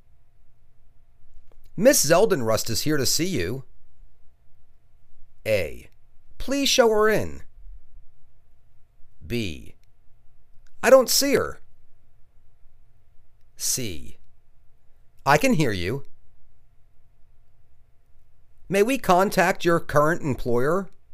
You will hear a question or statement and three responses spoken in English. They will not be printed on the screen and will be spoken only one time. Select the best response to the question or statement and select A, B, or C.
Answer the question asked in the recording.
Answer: Please show her in.